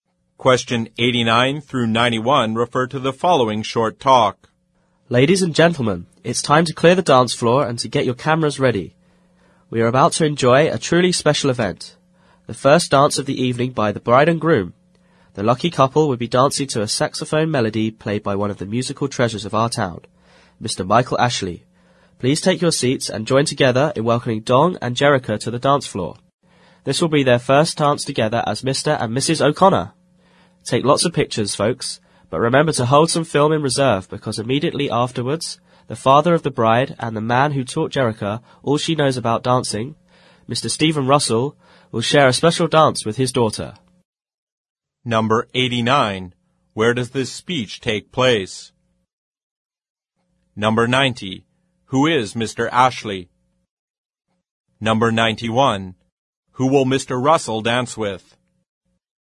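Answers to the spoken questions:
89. At a wedding reception
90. A local saxophone player
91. His daughter, the bride Jerrica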